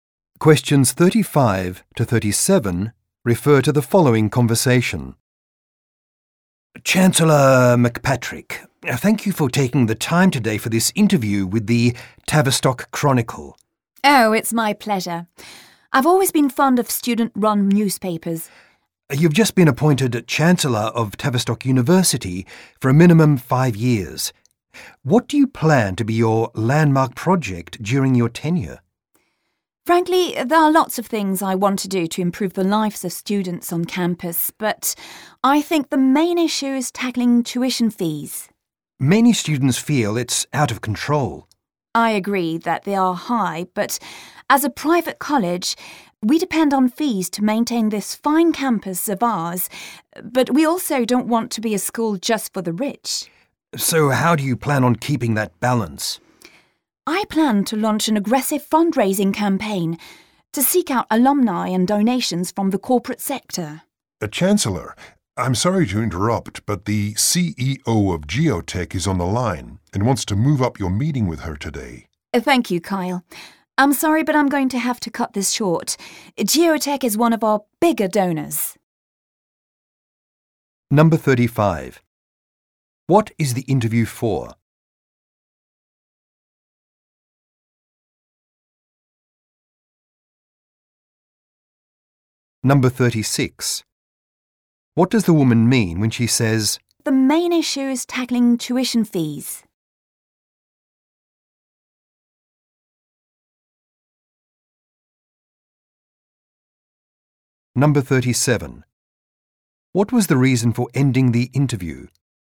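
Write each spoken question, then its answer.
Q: What is the interview for?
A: The student-run newspaper, the Tavistock Chronicle

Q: What does the woman mean when she says, "The main issue is tackling tuition fees"?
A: Dealing with high tuition fees is her top priority

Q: What was the reason for ending the interview?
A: The CEO of Geotech, a big donor, wanted to move up their meeting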